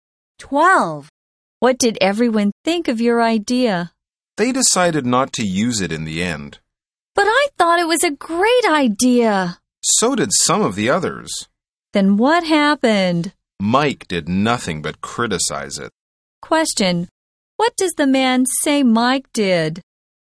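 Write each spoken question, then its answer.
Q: What does the man say Mike did?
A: Mike did nothing but criticize the idea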